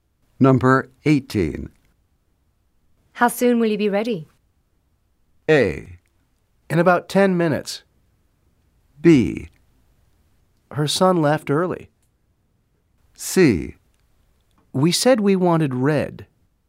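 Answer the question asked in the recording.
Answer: A: In about 10 minutes.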